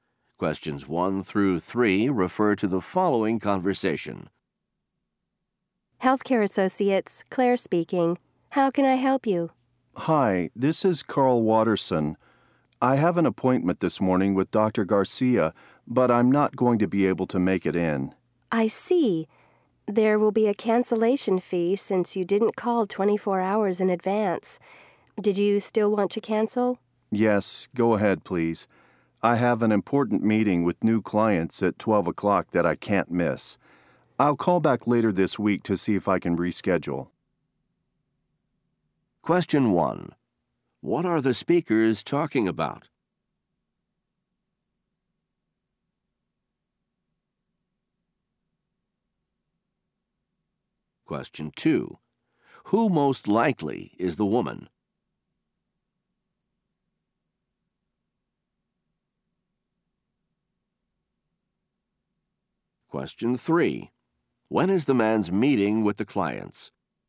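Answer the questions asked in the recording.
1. Canceling a doctor's appointment
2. A receptionist at a medical office
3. At 12 o'clock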